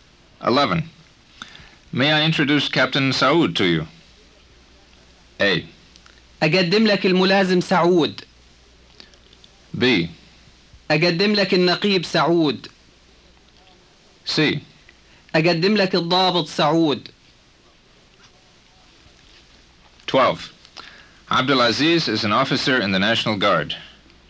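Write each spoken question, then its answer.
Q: May I introduce Captain Saud to you?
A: B: أقدم لك النقيب سعود.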